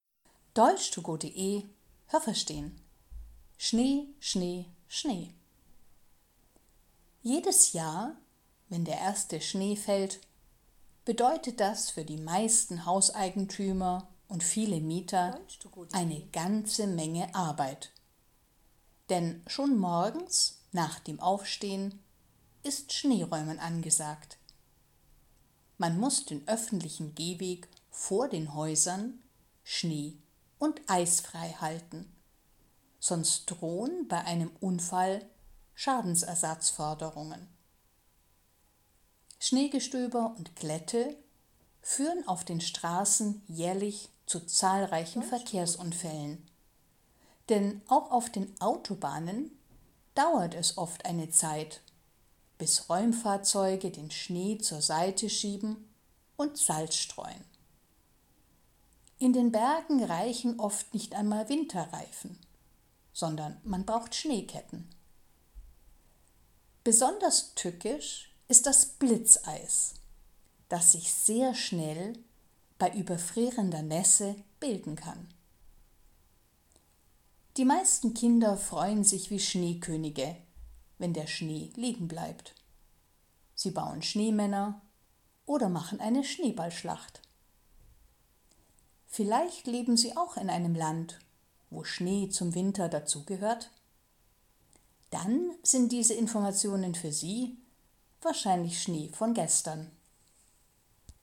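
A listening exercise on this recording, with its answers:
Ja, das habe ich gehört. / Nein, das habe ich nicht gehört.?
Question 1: Wenn Schnee fällt, müssen sich die meisten Hauseigentümer selber darum kümmern, dass vor ihrem Haus kein Schnee liegt.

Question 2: Der öffentliche Gehweg vor Häusern muss frei von Schnee sein.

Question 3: Passiert ein Unfall, weil der Hauseigentümer den Schnee nicht entfernt hat, muss er Geld bezahlen.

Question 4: Auf den Autobahnen fahren Räumfahrzeuge, die auch Salz streuen.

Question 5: In den Bergen braucht man heute keine Schneeketten mehr.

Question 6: Bltzeis: Das sind große Eiskörner, die bei Gewitter vom Himmel fallen.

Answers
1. Ja, das habe ich gehört.
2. Ja, das habe ich gehört.
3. Ja, das habe ich gehört.
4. Ja, das habe ich gehört.
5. Nein, das habe ich nicht gehört.
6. Nein, das habe ich nicht gehört.

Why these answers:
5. Man braucht in den Bergen oft Schneeketten, weil normale Winterreifen nicht genügen.
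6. Wenn es regnet und das Regenwasser schnell am Boden gefriert, wird die Straße zu einer Eisfläche. Weil das sehr schnell (= blitzschnell) passieren kann, nennt man das Blitzeis.

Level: B1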